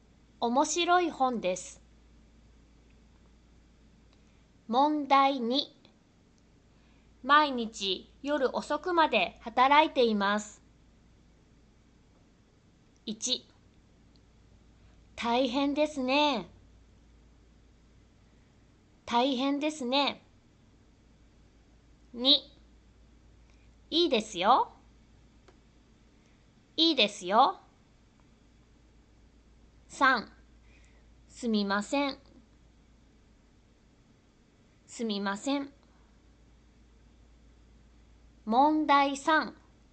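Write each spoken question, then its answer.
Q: 毎日夜遅くまで働いています。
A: 1: 大変ですね。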